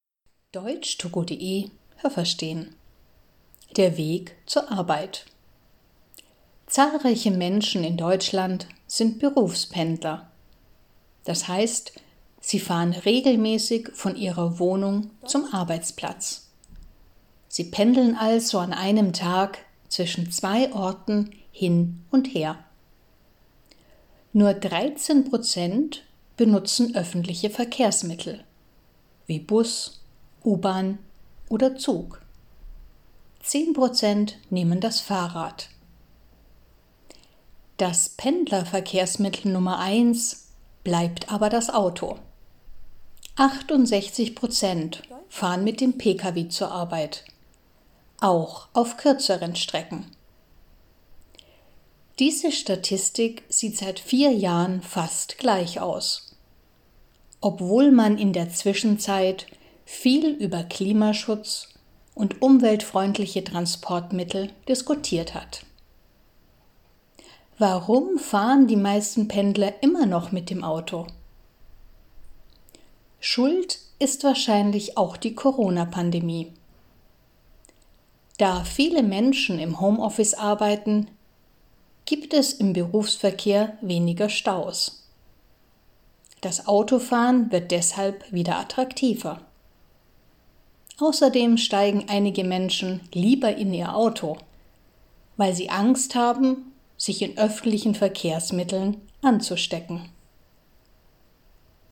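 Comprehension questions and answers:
Was haben Sie gehört? Es gibt nur eine korrekte Antwort.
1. Berufspendler arbeiten ...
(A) direkt an ihrem Wohnort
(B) nicht an ihrem Wohnort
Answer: (B) nicht an ihrem Wohnort

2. _____ der Berufspendler benutzen öffentliche Verkehrsmittel.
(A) 13 Prozent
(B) 30 Prozent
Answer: (A) 13 Prozent

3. _____ der Pendler benutzen das Auto.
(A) 68 Prozent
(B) 18 Prozent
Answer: (A) 68 Prozent

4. Wenn Pendler das Auto benutzen, dann, ...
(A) nicht für kurze Strecken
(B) auch für kurze Strecken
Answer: (B) auch für kurze Strecken

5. Heute nehmen _____ umweltfreundliche Transportmittel _____vor 4 Jahren.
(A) viel mehr Pendler .... als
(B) fast genauso viele Pendler ... wie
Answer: (B) fast genauso viele Pendler ... wie

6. Während der Corona-Pandemie: Pendler fahren gerne mit dem Auto, ...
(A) weil nicht so viele Autos auf der Straße sind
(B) obwohl sie im Homeoffice arbeiten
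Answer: (A) weil nicht so viele Autos auf der Straße sind

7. Während der Corona-Pandemie: Pendler benutzen keine öffentlichen Verkehrsmittel, ...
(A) denn sie haben Angst, krank zu werden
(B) denn sie haben Angst, unpünktlich zu sein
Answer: (A) denn sie haben Angst, krank zu werden

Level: A2

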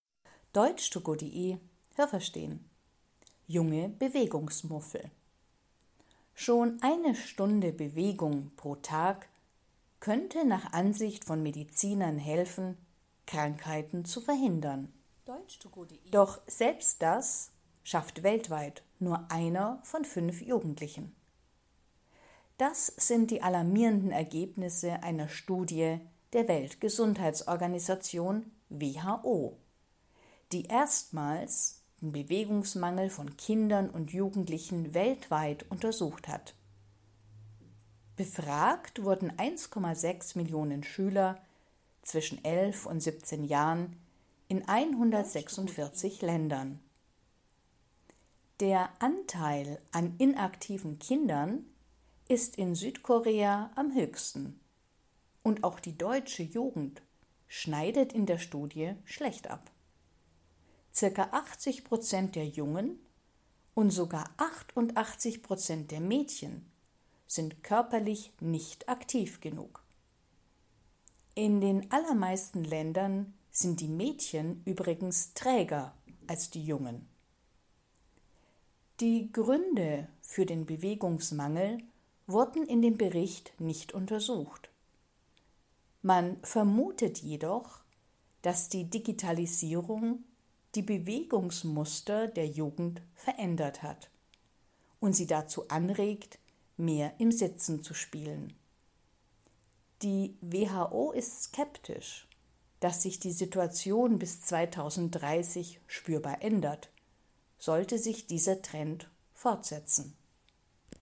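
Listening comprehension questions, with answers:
Was haben Sie gehört? Es gibt nur eine korrekte Antwort.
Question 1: 4 von 5 Jugendlichen bewegen sich ...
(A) eine Stunde pro Tag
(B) weniger als eine Stunde pro Tag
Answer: (B) weniger als eine Stunde pro Tag

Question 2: Die WHO hat Schüler im Alter von 11 bis 17 Jahren ____ interviewt.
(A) aus 164 Ländern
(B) aus 146 Ländern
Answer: (B) aus 146 Ländern

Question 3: 88 Prozent der ______ bewegen sich weniger als eine Stunde pro Tag.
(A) Jungen in Deutschland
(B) der Mädchen in Deutschland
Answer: (B) der Mädchen in Deutschland

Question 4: Auf der ganzen Welt sind meistens ...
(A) Männer körperlich aktiver als Frauen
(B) Frauen körperlich aktiver als Männer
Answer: (A) Männer körperlich aktiver als Frauen

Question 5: Die Ursachen für den Bewegungsmangel von Jugendlichen ...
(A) wurden in dieser Studie analysiert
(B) waren kein Thema der Studie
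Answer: (B) waren kein Thema der Studie

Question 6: Man denkt, dass die Digitalisierung ...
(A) die körperliche Aktivität von Jugendlichen beeinflusst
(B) eine geringere Rolle spielt, als bisher vermutet wurde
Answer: (A) die körperliche Aktivität von Jugendlichen beeinflusst

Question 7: Die WHO _____, dass sich die Situation bis 2030 verbessert.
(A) ist fest davon überzeugt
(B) zweifelt daran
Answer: (B) zweifelt daran

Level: B2

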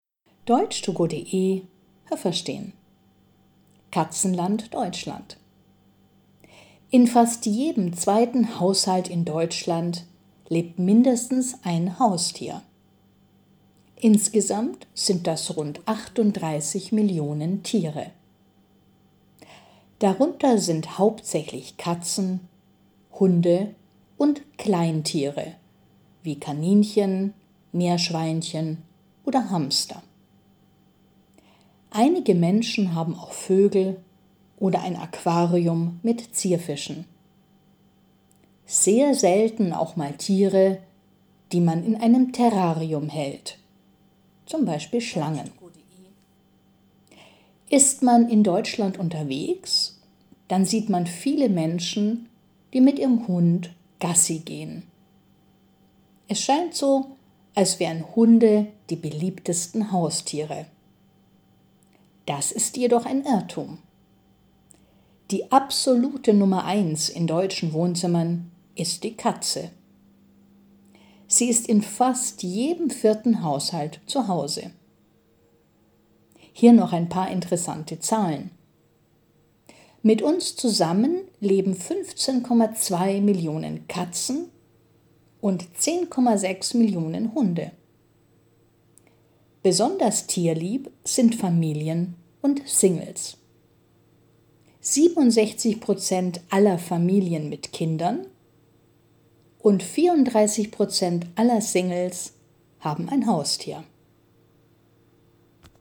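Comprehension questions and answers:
Was haben Sie gehört? Es gibt nur eine korrekte Antwort.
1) In Deutschland ...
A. lebt in fast jedem zweiten Haushalt eine Katze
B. leben 38 Millionen Haustiere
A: B. leben 38 Millionen Haustiere

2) Die Deutschen haben hauptsächlich ...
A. Katzen, Hunde und Kleintiere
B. Vögel, Zierfische und Schlangen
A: A. Katzen, Hunde und Kleintiere

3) Kleintiere sind zum Beispiel ...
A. Kaninchen und Schweine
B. Meerschweinchen und Hamster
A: B. Meerschweinchen und Hamster

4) Wenn man in Deutschland unterwegs ist, dann sieht man ...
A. viele Katzen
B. viele Hunde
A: B. viele Hunde

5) In fast jedem vierten Haushalt in Deutschland lebt ...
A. ein Hund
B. eine Katze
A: B. eine Katze

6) _____ Katzen leben mit Menschen zusammen.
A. 50,2 Millionen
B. 15,2 Millionen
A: B. 15,2 Millionen

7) Singles sind _____ tierlieb.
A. besonders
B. nicht besonders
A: A. besonders

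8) _____ Prozent aller Familien mit Kindern haben ein Haustier.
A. 67 Prozent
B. 76 Prozent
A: A. 67 Prozent

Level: A2

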